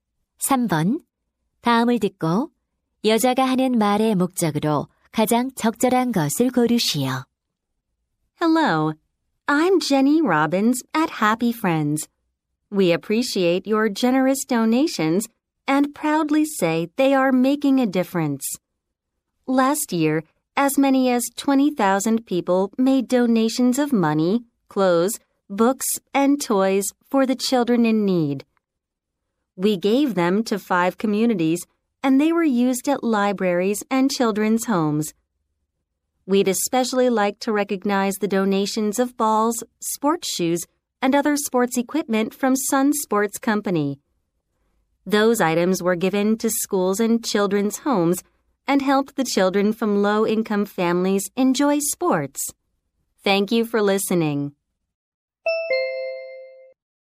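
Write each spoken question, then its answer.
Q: 다음을 듣고 여자가 하는 말의 목적으로 가장 적절한 것을 고르시오.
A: 기부에 감사하고 기부 물품의 사용 결과를 알리려고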